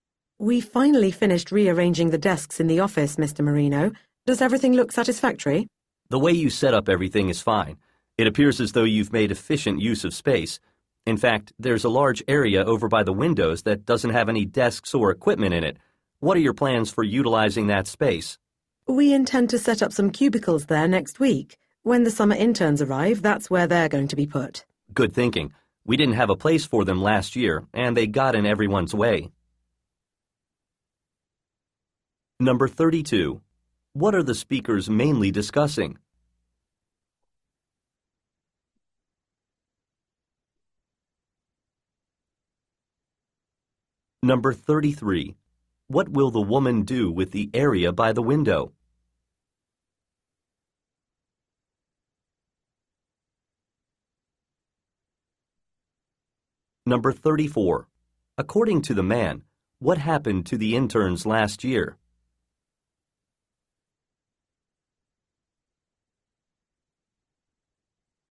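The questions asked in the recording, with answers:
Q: What are the speakers mainly discussing?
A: The new arrangement of the office desks

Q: What will the woman do with the area by the window?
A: Set up cubicles there for the summer interns

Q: According to the man, what happened to the interns last year?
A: There was no place for them and they got in everyone's way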